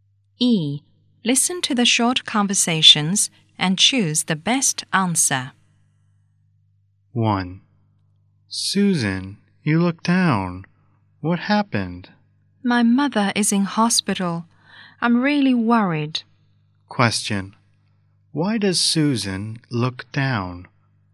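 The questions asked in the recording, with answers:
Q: Why does Susan look down?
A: Because her mother is in hospital.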